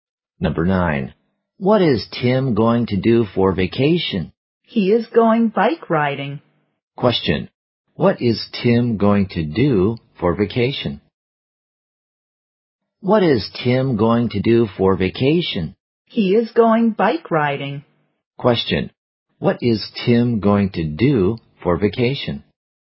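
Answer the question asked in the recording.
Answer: Go bike riding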